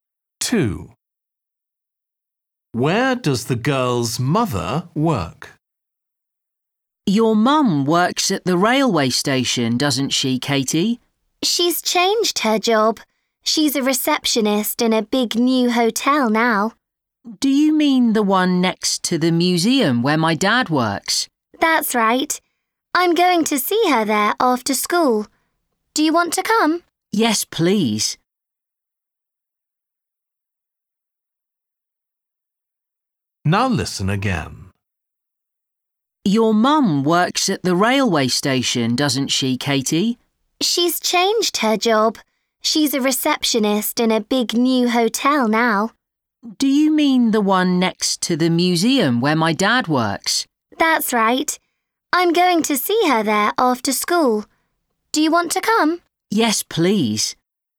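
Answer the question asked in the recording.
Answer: In a big new hotel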